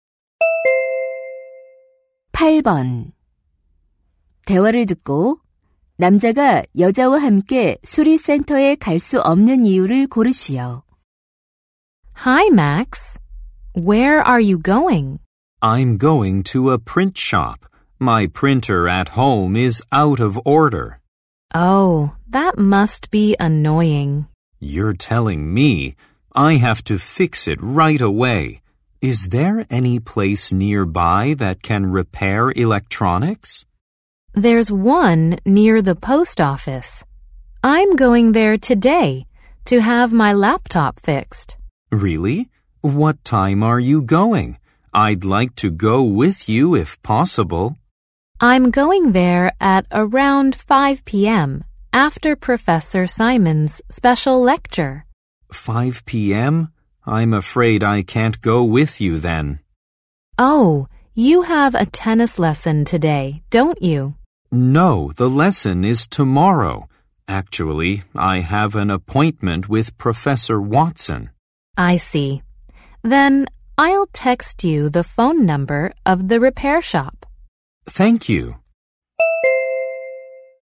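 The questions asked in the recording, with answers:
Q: 대화를 듣고 남자가 여자와 함께 수리센터에 갈 수 없는 이유를 고르시오.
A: Watson 교수와 약속이 있어서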